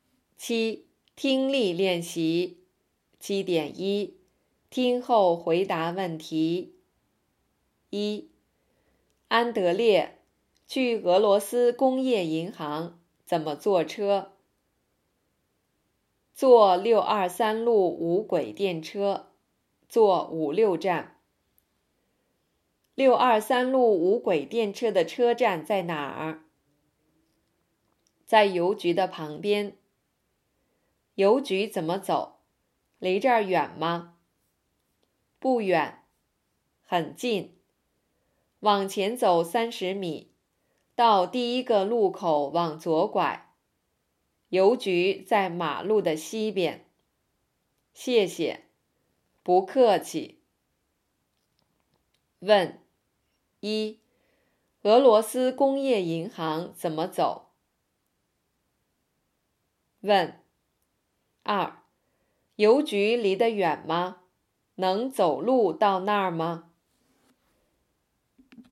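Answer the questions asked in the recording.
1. 坐623路无轨电车,坐5、6站
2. 不远,很近,能走路到那儿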